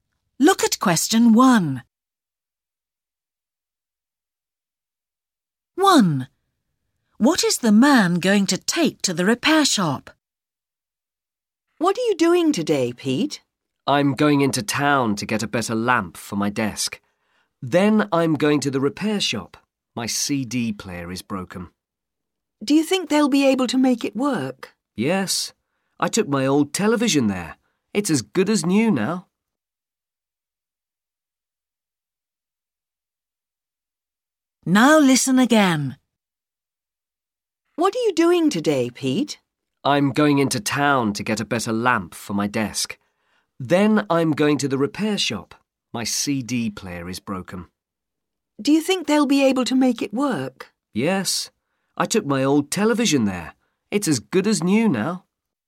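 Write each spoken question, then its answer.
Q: What is the man going to take to the repair shop?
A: his CD player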